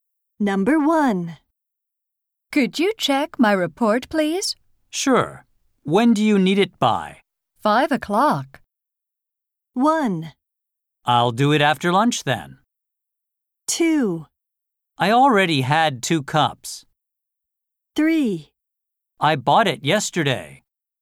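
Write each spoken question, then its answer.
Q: 5 o'clock.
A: 1: I'll do it after lunch then.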